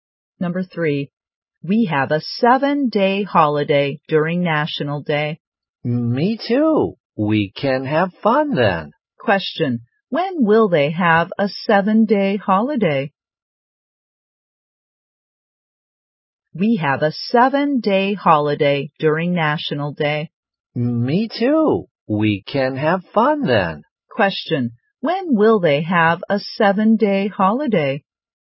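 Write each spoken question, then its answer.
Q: When will they have a 7-day holiday?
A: During National Day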